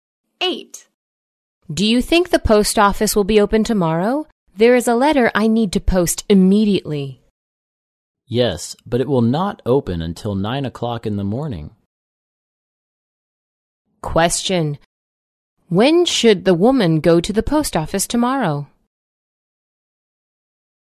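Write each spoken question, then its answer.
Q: When should the woman go to the post office tomorrow?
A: At 9 o'clock in the morning or later.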